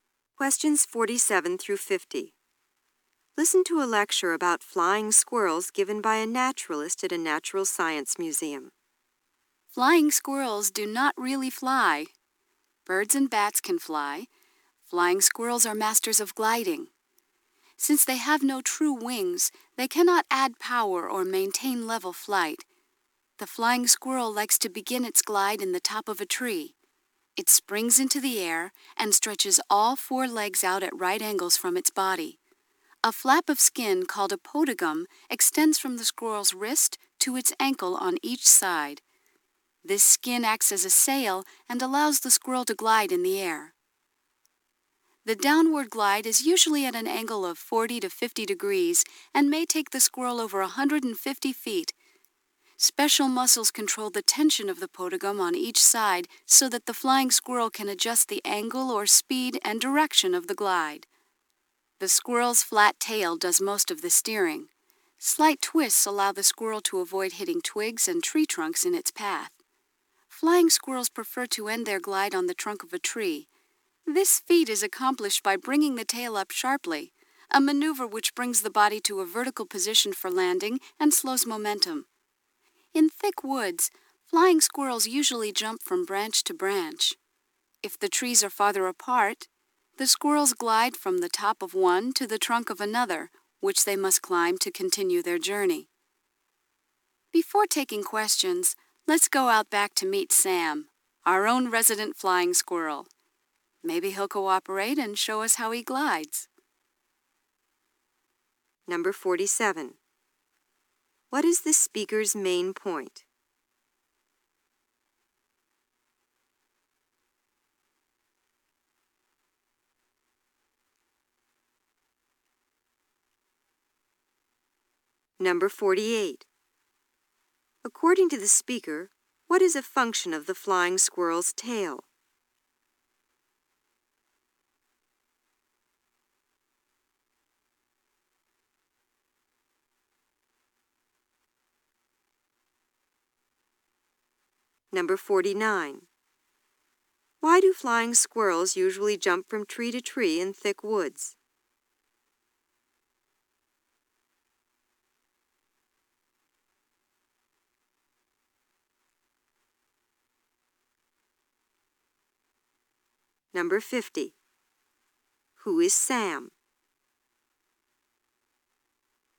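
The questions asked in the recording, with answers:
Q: What is the speaker's main point?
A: Flying squirrels glide rather than really fly

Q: According to the speaker, what is a function of the flying squirrel's tail?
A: Steering

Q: Who is Sam?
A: The museum's resident flying squirrel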